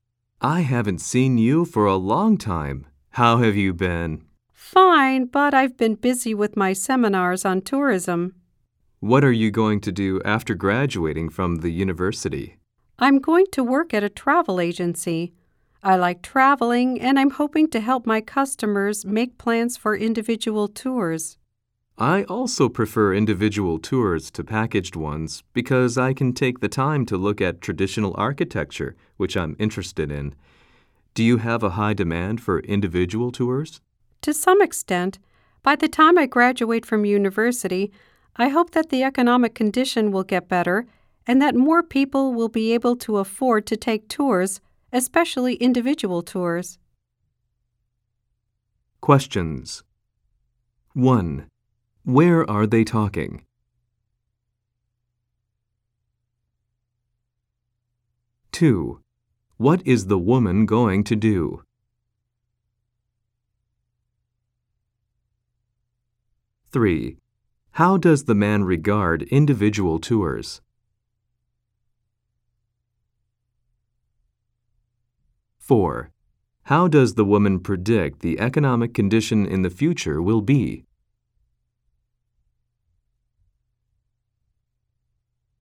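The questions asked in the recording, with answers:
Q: How does the woman predict the economic condition in the future will be?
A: She hopes it will get better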